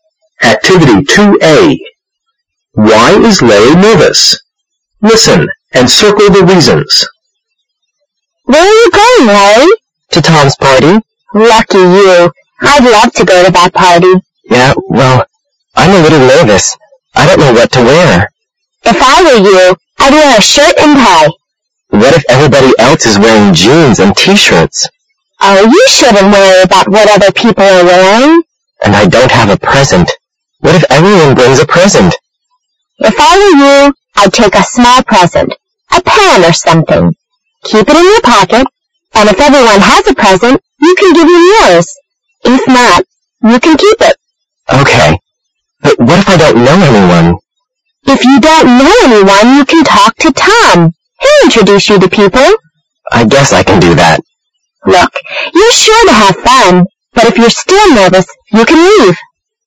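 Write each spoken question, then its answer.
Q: Why is Larry nervous?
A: He doesn't know what to wear, he doesn't have a present, and he might not know anyone at the party.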